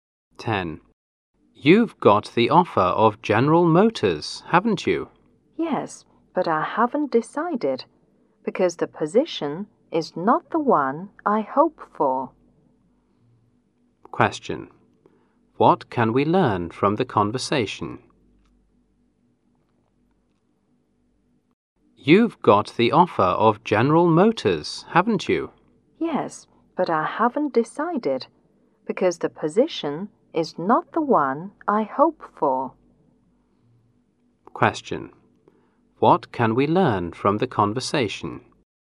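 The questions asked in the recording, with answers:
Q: What can we learn from the conversation?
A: He hasn't decided whether to accept the General Motors offer, because it's not the position he hoped for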